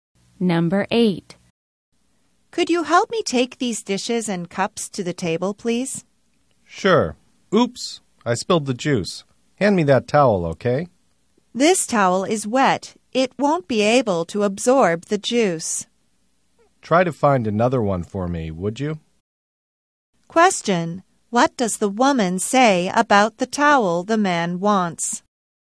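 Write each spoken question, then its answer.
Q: What does the woman say about the towel the man wants?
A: It is wet and won't absorb the juice.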